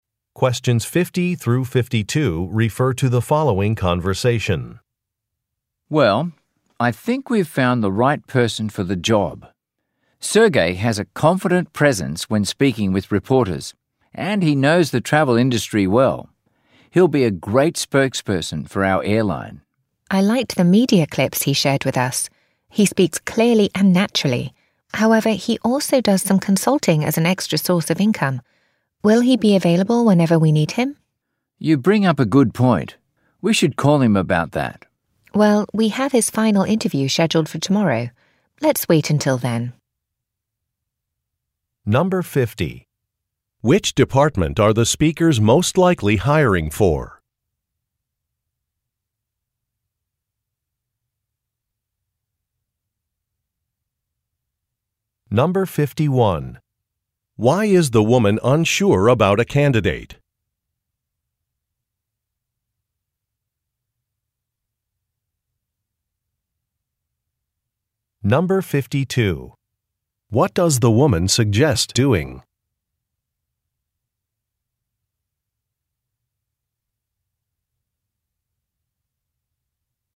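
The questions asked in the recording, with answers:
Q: Which department are the speakers most likely hiring for?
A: Public relations (an airline spokesperson)

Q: Why is the woman unsure about a candidate?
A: He also works as a consultant, so he may not always be available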